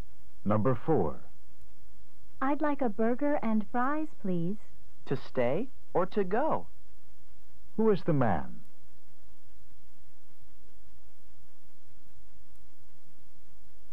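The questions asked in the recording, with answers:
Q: Who is the man?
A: A fast-food restaurant worker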